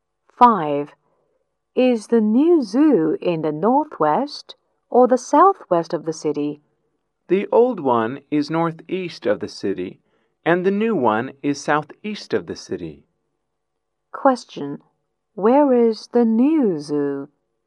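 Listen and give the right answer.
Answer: Southeast of the city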